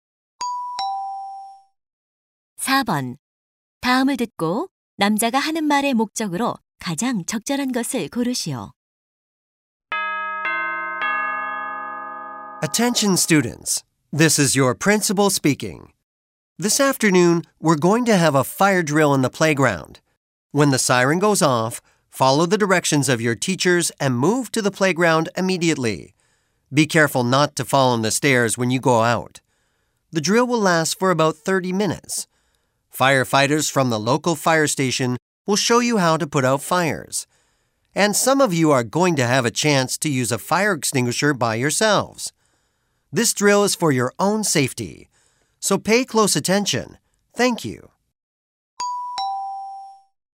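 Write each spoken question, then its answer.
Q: 다음을 듣고 남자가 하는 말의 목적으로 가장 적절한 것을 고르시오.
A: 오늘 오후 소방 대피 훈련을 안내하려고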